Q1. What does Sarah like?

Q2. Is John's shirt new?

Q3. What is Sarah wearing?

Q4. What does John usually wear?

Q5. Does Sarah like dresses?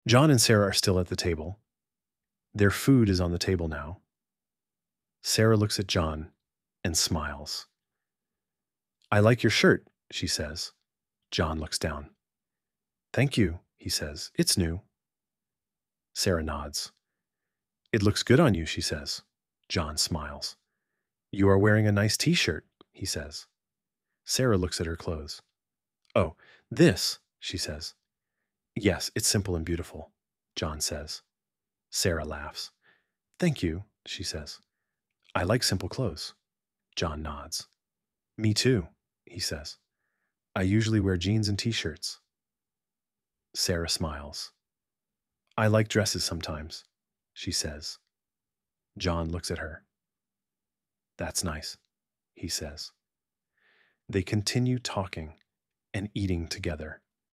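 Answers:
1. John's shirt, simple clothes and sometimes dresses
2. Yes, it's new.
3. A nice t-shirt
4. Jeans and t-shirts
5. Yes, sometimes

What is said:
John and Sarah are still at the table. Their food is on the table now.
Sarah looks at John and smiles.
"I like your shirt," she says.
John looks down.
"Thank you," he says.
"It's new."
Sarah nods.
"It looks good on you," she says.
John smiles.
"You are wearing a nice t-shirt," he says.
Sarah looks at her clothes.
"Thank you," she says.
"I like simple clothes."
John nods.
"Me too," he says.
"I usually wear jeans and t-shirts."
Sarah smiles.
"I like dresses sometimes," she says.
"That's nice," he says.
They continue talking and eating together.

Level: Inglês Básico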